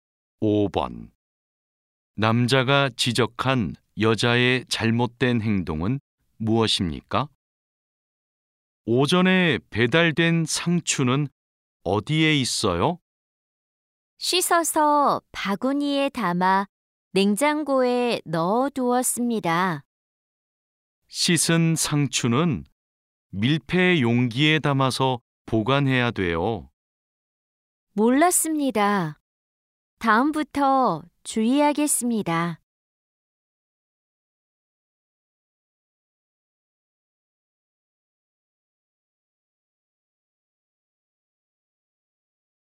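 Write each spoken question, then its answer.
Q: 남자가 지적한 여자의 잘못된 행동은 무엇입니까?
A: 씻은 상추를 밀폐 용기가 아닌 바구니에 담아 보관했다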